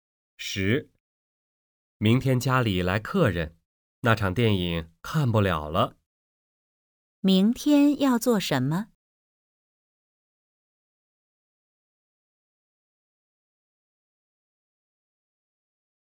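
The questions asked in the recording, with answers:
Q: 明天要做什么?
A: 在家接待客人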